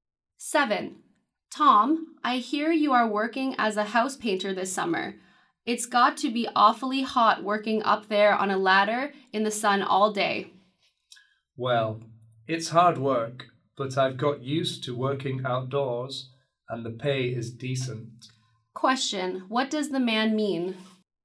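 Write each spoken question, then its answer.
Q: Question, what does the man mean?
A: He doesn't mind the job; it pays well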